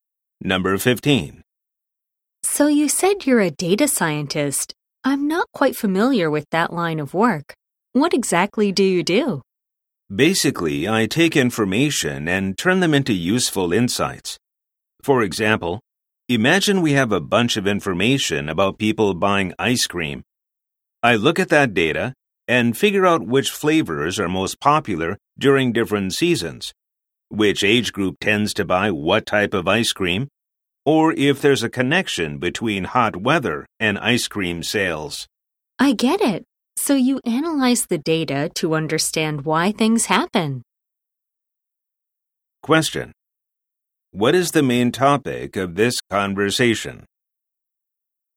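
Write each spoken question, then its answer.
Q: What is the main topic of this conversation?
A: What a data scientist does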